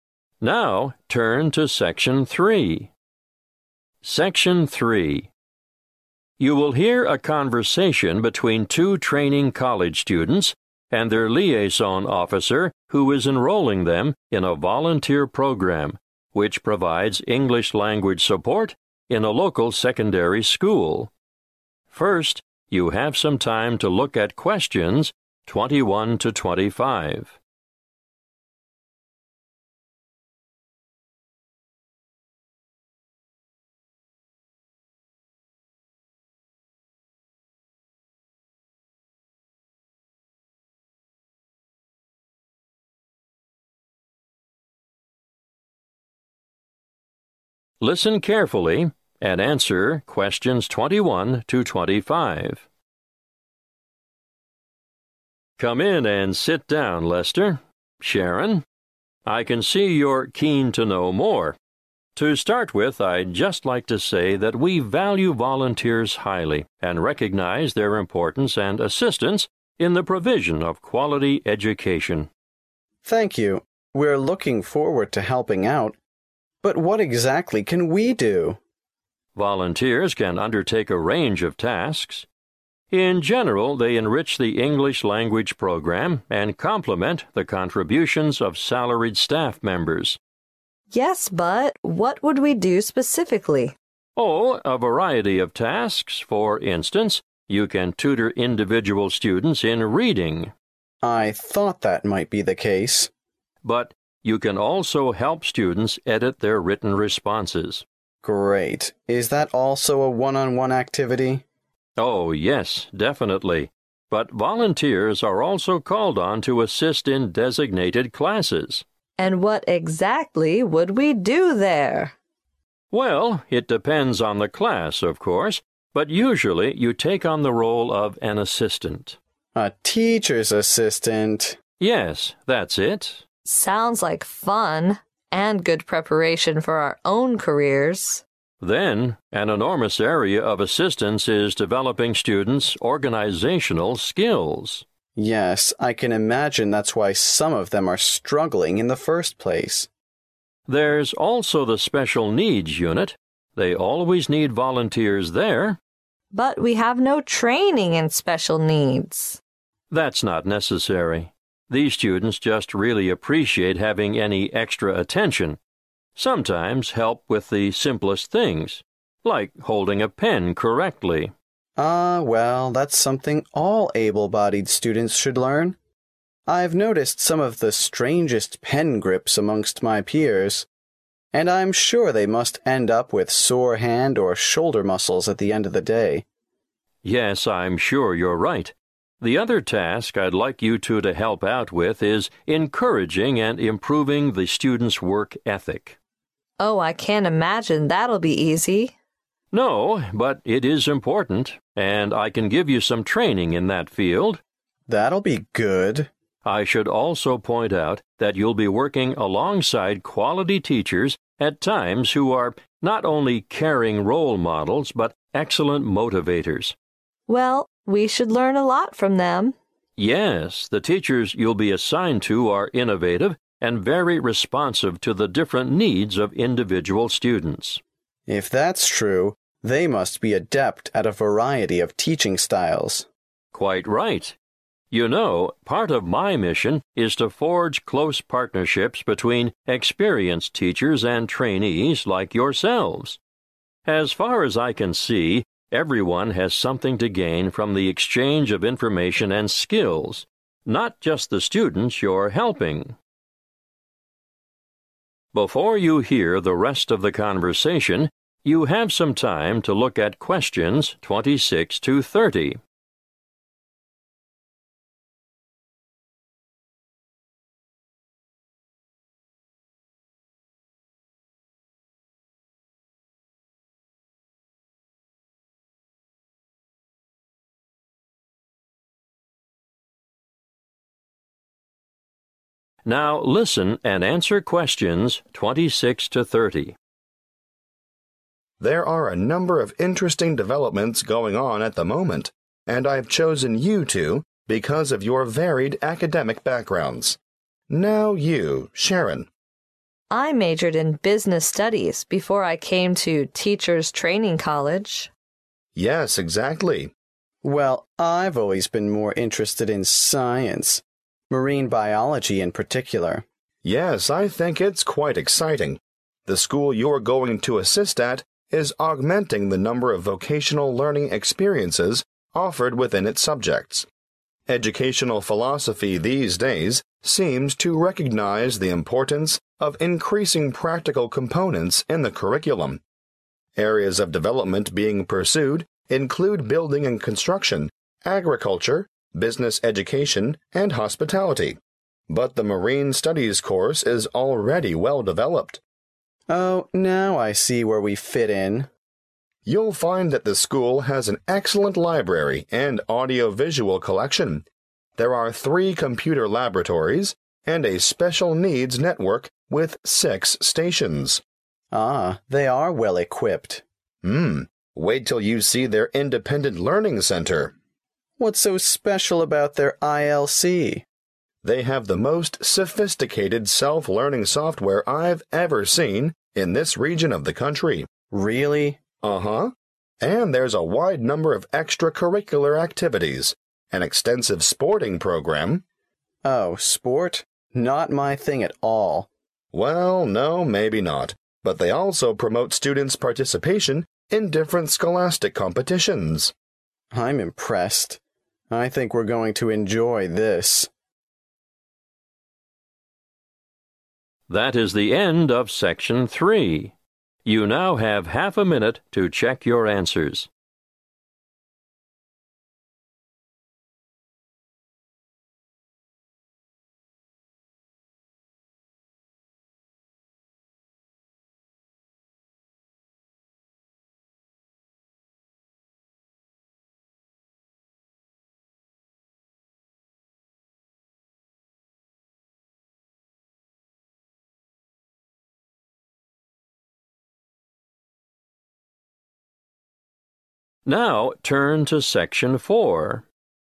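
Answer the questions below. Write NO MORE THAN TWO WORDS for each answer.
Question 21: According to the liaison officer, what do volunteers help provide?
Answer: quality education

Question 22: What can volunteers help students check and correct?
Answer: written responses

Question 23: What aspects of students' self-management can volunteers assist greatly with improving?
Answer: organizational skills

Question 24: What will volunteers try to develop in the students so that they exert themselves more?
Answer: work ethic

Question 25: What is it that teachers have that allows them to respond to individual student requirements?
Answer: teaching styles

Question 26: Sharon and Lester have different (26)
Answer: academic backgrounds

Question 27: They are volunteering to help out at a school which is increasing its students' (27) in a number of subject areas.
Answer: vocational learning experiences

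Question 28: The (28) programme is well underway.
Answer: Marine Studies

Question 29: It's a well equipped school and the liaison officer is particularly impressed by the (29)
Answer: self-learning software

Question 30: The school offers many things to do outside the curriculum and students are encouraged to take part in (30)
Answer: scholastic competitions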